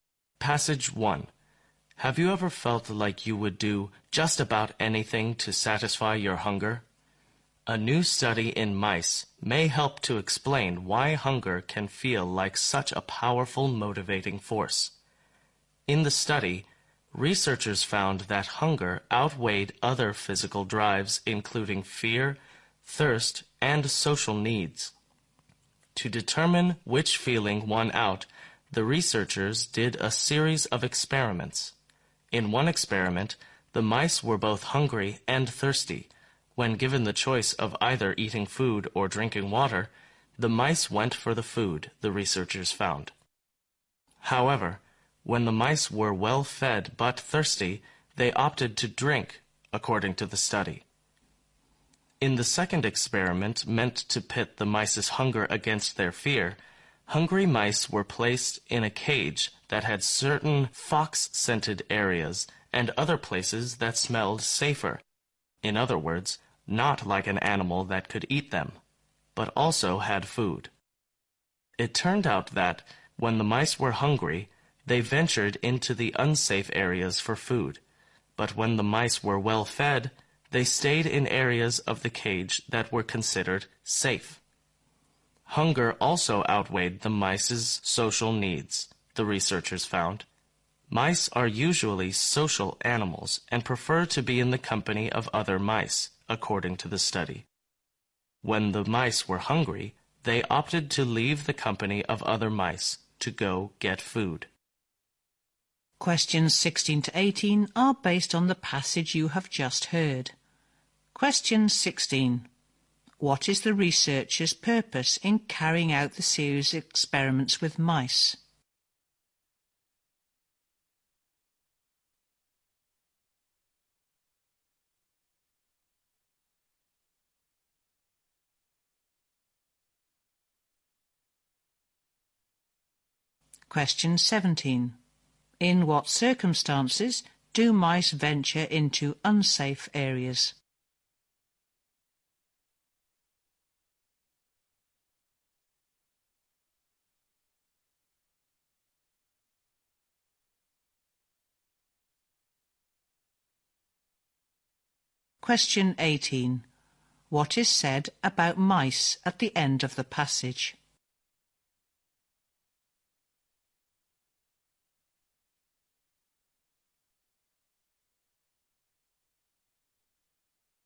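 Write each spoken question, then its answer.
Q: What is the researcher's purpose in carrying out the series of experiments with mice?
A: To find out which physical drive wins out over the others.

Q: In what circumstances do mice venture into unsafe areas?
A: When they are hungry.

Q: What is said about mice at the end of the passage?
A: They are social animals but leave other mice to get food when hungry.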